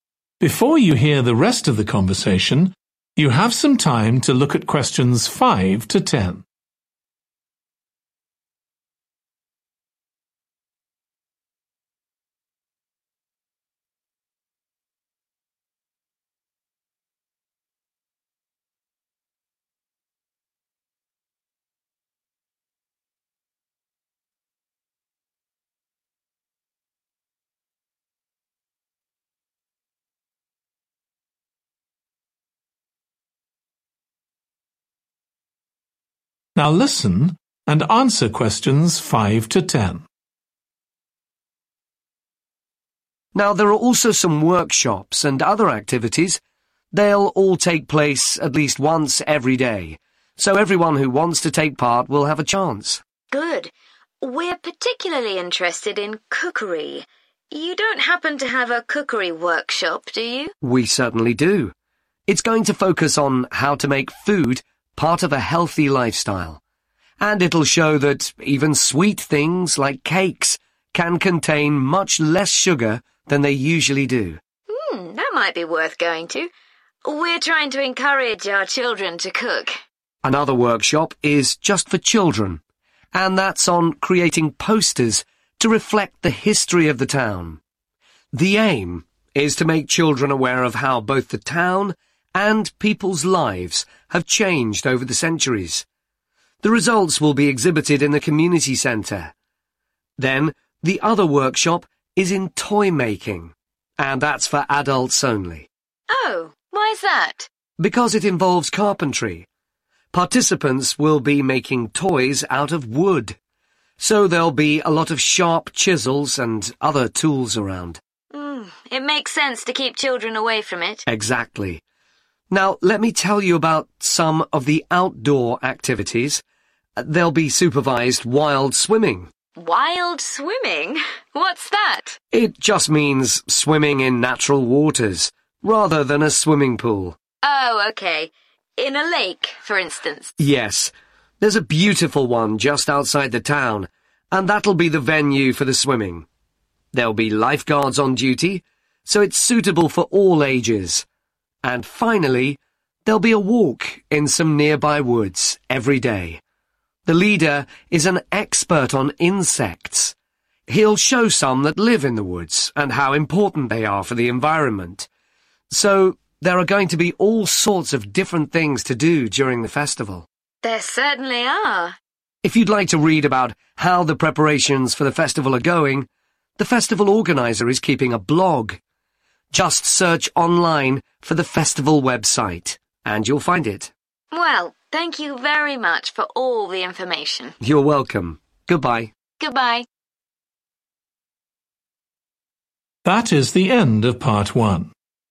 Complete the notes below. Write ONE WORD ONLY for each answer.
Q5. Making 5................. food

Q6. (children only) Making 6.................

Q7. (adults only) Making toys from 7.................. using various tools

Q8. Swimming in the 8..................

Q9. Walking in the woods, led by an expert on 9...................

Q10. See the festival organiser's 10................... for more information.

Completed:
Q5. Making healthy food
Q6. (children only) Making posters
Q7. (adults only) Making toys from wood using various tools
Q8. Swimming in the lake
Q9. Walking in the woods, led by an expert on insects
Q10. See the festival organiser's blog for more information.